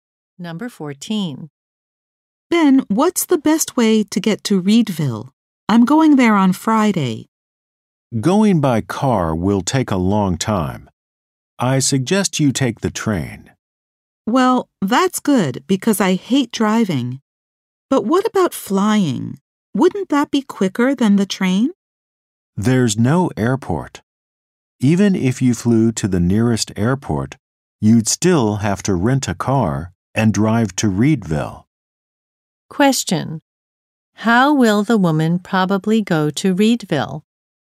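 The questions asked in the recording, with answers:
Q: How will the woman probably go to Reedville?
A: By train.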